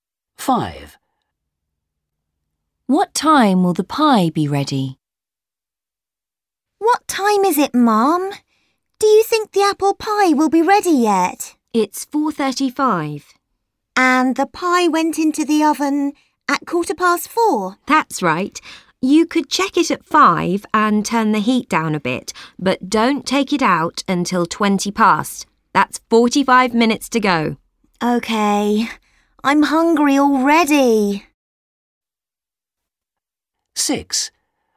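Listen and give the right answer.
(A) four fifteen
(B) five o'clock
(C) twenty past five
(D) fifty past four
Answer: (C) twenty past five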